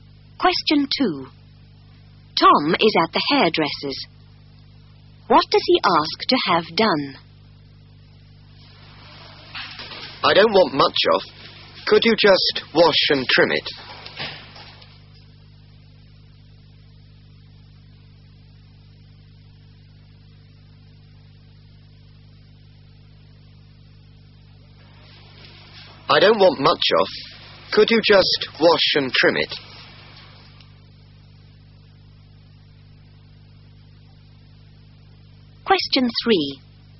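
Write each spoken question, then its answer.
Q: What does he ask to have done?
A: Have his hair washed and trimmed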